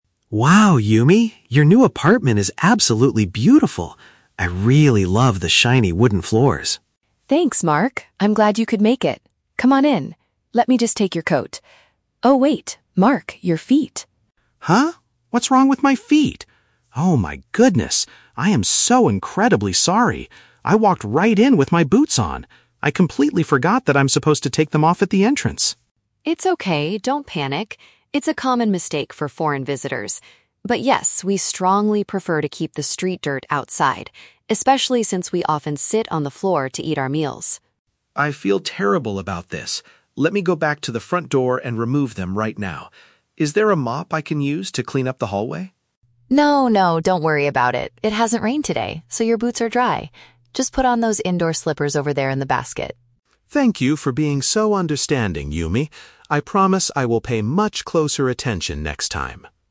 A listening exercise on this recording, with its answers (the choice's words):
Listen to the conversation between a foreign guest and his host. Choose the correct answer (A, B, or C) for each question.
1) What is the main problem at the beginning of the conversation?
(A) The guest accidentally spilled dirt on the wooden furniture.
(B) The guest forgot to remove his footwear before entering the house.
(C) The guest brought the wrong pair of slippers for the host.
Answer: The guest forgot to remove his footwear before entering the house.

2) Why does Yumi say it is important to follow this household rule?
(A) Because people in her culture frequently sit on the ground.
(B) Because she recently spent a lot of money to polish the floors.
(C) Because she wants to keep her new indoor slippers completely clean.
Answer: Because people in her culture frequently sit on the ground.

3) How does Mark offer to fix his mistake?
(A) He promises to buy Yumi a new set of cleaning tools.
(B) He decides to wait outside the apartment until dinner is ready.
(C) He asks for a tool to wash the area where he walked.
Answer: He asks for a tool to wash the area where he walked.

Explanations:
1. Mark realizes his mistake and says, "I walked right in with my boots on... I completely forgot that I'm supposed to take them off" (forgot to remove his footwear). Option (A) is a trap; Yumi mentions "street dirt" and "wooden floors", but Mark didn't spill dirt on the furniture. Option (C) is a trap; slippers are mentioned later, but Mark didn't bring them.
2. Yumi explains that they want to keep the dirt outside because "we often sit on the floor to eat our meals" (sit on the ground). Option (B) is a trap; Mark comments on the "shiny wooden floors", but Yumi never says she paid to polish them. Option (C) is a trap; the slippers are for Mark to wear, not the reason for the rule.
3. Mark feels terrible and asks, "Is there a mop I can use to clean up the hallway?" (asks for a tool to wash the area). Option (A) is not mentioned. Option (B) is a trap; he says he will "go back to the front door" to take off his boots, but he doesn't say he will wait outside until dinner.

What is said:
Mark: Wow, Yumi, your new apartment is absolutely beautiful! I really love the shiny wooden floors.
Yumi: Thanks, Mark! I'm glad you could make it. Come on in. Let me just take your coat... Oh, wait! Mark, your feet!
Mark: Huh? What's wrong with my feet? Oh my goodness! I am so incredibly sorry. I walked right in with my boots on. I completely forgot that I'm supposed to take them off at the entrance.
Yumi: It's okay, don't panic. It's a common mistake for foreign visitors. But yes, we strongly prefer to keep the street dirt outside, especially since we often sit on the floor to eat our meals.
Mark: I feel terrible about this. Let me go back to the front door and remove them right now. Is there a mop I can use to clean up the hallway?
Yumi: No, no, don't worry about it. It hasn't rained today, so your boots are dry. Just put on those indoor slippers over there in the basket.
Mark: Thank you for being so understanding, Yumi. I promise I will pay much closer attention next time!